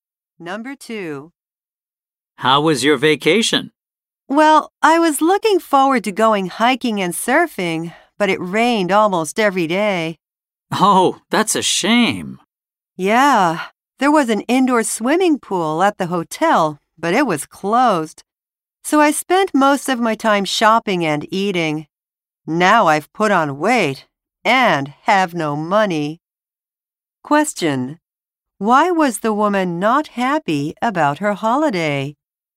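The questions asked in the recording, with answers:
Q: Why was the woman not happy about her holiday?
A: It rained almost every day, so she couldn't go hiking or surfing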